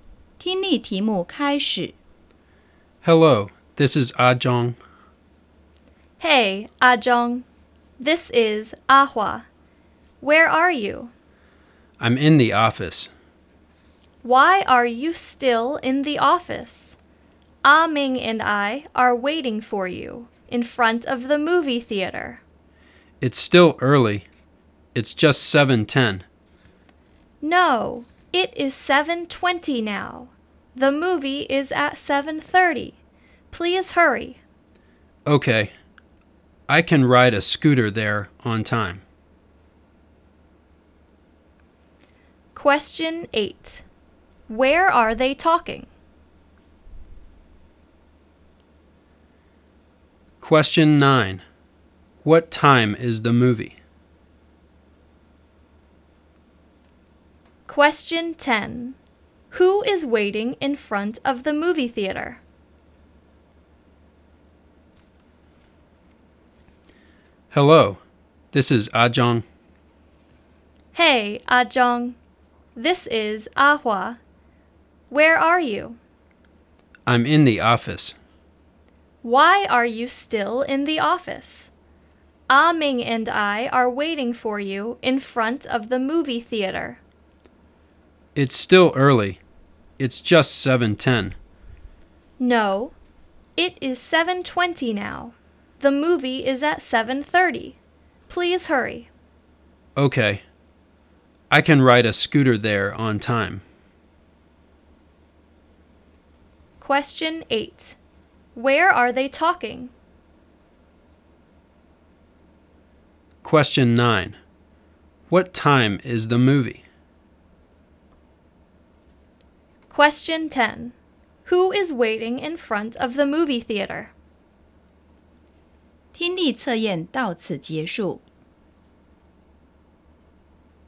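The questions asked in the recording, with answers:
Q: What time is the movie?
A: 7:30

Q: Who is waiting in front of the movie theater?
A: Ah Hua and Ah Ming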